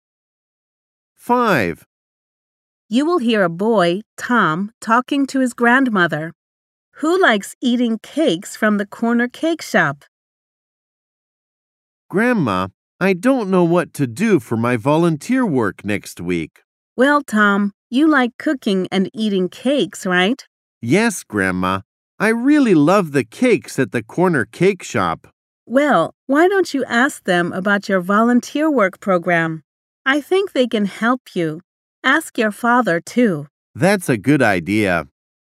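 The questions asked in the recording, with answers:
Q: Who likes eating cakes from the corner cake shop?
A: Tom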